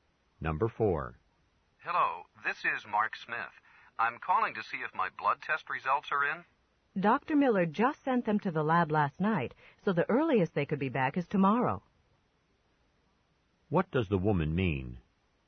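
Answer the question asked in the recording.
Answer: The results won't be back until tomorrow at the earliest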